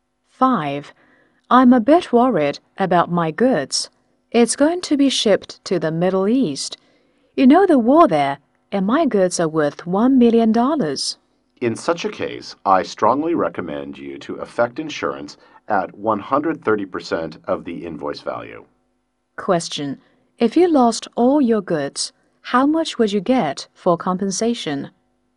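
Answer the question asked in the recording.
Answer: $1.3 million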